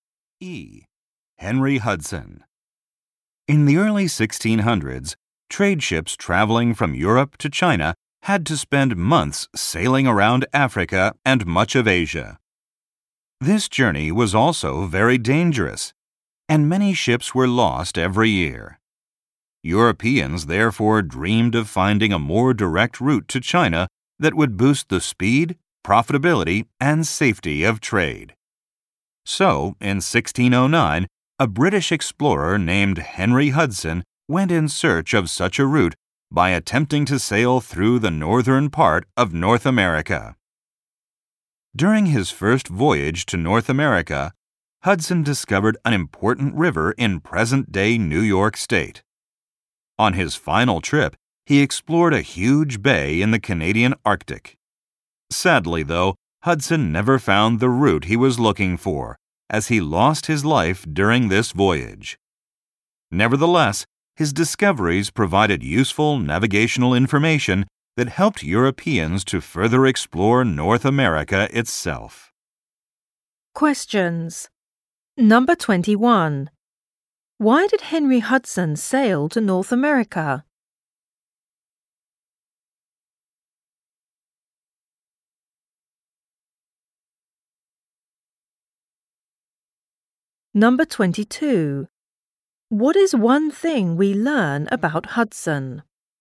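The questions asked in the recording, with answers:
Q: Why did Henry Hudson sail to North America?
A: To find a more direct route to China.

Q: What is one thing we learn about Hudson?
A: He died on his final voyage without finding the route.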